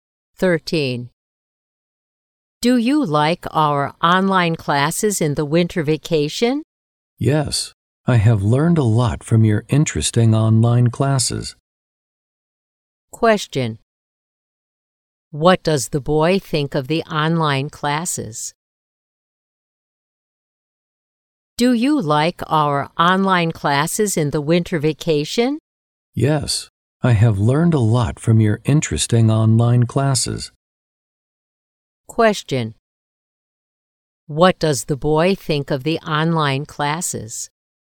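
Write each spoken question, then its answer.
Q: What does the boy think of the online classes?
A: Interesting; he learned a lot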